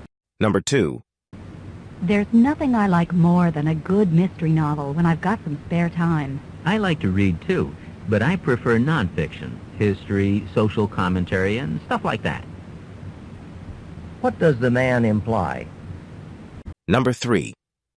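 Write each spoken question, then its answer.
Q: What does the man imply?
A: He prefers reading nonfiction to mystery novels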